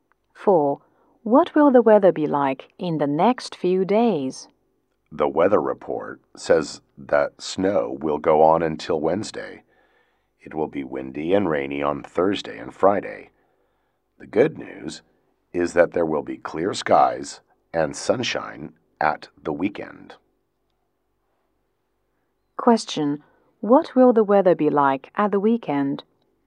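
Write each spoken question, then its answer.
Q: What will the weather be like at the weekend?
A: Clear and sunny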